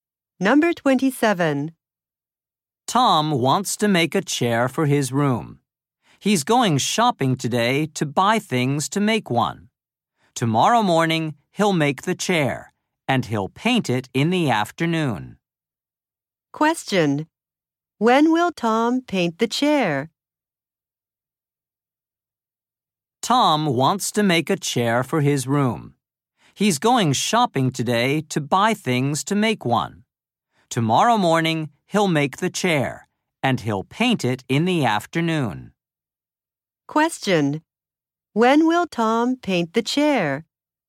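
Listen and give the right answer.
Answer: Tomorrow afternoon.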